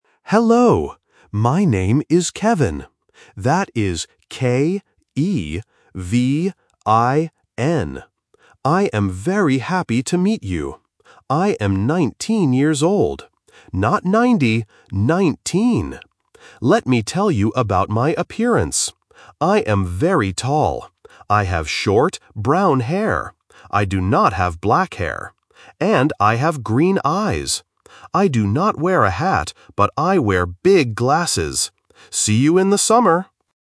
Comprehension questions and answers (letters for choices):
Listen to the video message and choose the correct answer (A, B, or C).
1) How old is Kevin?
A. 9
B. 19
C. 90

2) What color is Kevin's hair?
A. Blond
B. Black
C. Brown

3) What does Kevin wear?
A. A hat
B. Big glasses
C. A watch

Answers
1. B
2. C
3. B

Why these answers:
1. Kevin says clearly, "I am 19 years old." Why the trap is wrong: Option (C) 90 is a trap because the pronunciation of "nineteen" and "ninety" can be confusing. Kevin even corrects this by saying, "Not 90, 19!" Option (A) 9 is not mentioned.
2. Kevin describes himself by saying, "I have short, brown hair." Why the trap is wrong: Option (B) Black is a trap. He mentions the word "black" but says, "I do not have black hair." Option (A) Blond is a common hair color but is never mentioned.
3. Kevin states at the end, "I wear big glasses." Why the trap is wrong: Option (A) A hat is a trap because he mentions it but says, "I do not wear a hat." Option (C) A watch is a plausible accessory but is not in the audio.

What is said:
Exchange Student: Hello! My name is Kevin. That is K-E-V-I-N. I am very happy to meet you. I am 19 years old. Not 90, 19! Let me tell you about my appearance. I have short, brown hair. I do not have black hair. And I have green eyes. I do not wear a hat, but I wear big glasses. See you in the summer!

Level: A1